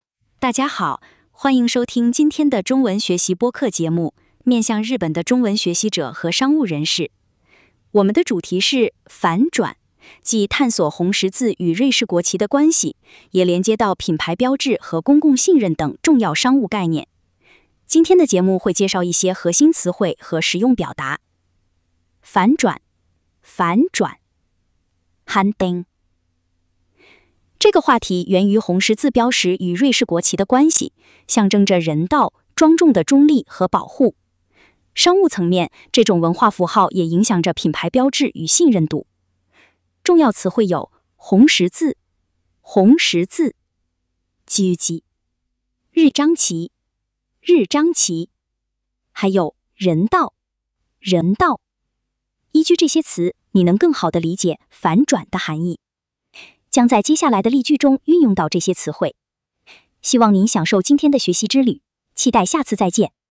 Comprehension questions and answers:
红十字标志が象徴する3つの価値は何ですか。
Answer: 人道、保护、中立。